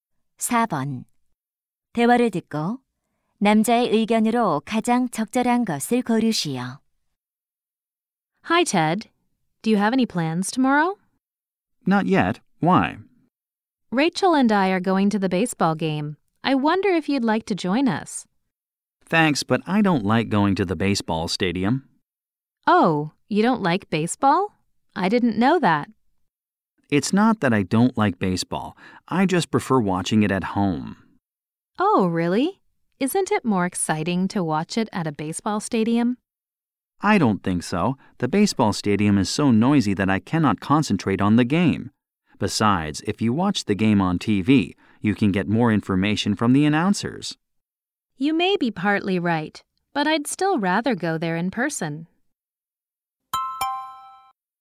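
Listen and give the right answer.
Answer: 야구 경기는 경기장보다 집에서 TV로 보는 것이 낫다.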